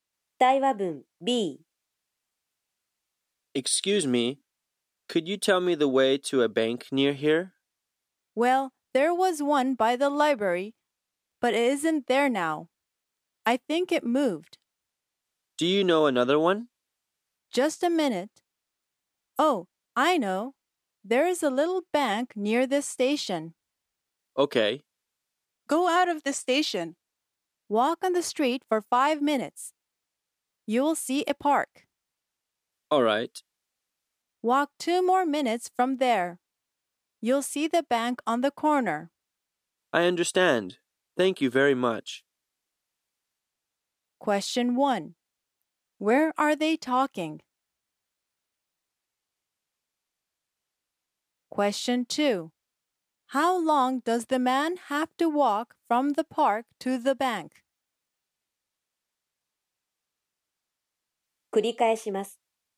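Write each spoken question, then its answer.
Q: Where are they talking?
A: At a station.

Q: How long does the man have to walk from the park to the bank?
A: Two minutes.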